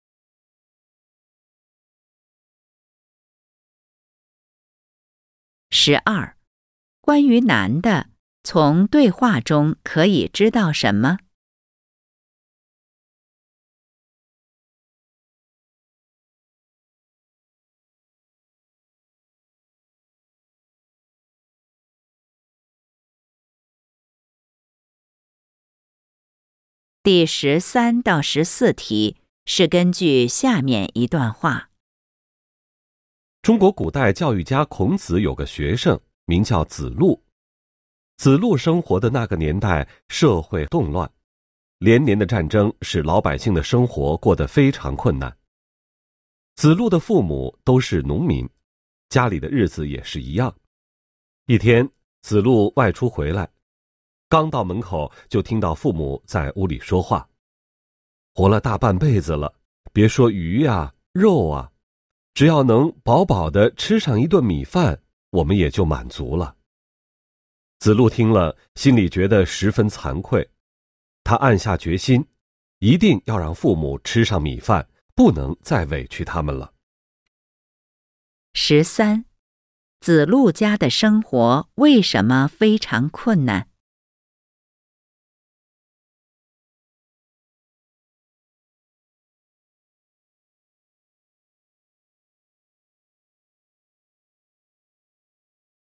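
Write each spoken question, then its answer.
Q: 子路家的生活为什么非常困难?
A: 社会动乱,连年战争

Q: 子路听到父母的谈话后,心里感到怎么样?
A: 十分惭愧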